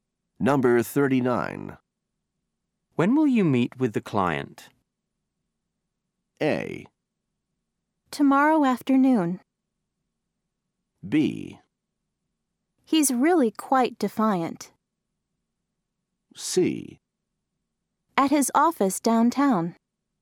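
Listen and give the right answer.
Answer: A: Tomorrow afternoon.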